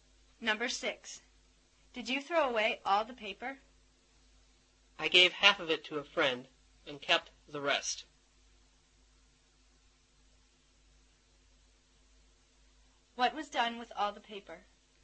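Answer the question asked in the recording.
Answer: Half was given to a friend and the rest was kept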